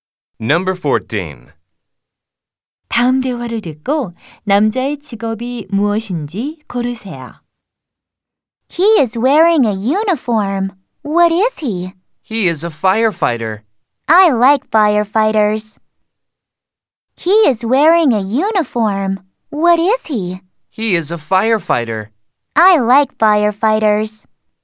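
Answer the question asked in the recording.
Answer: 소방관 (firefighter)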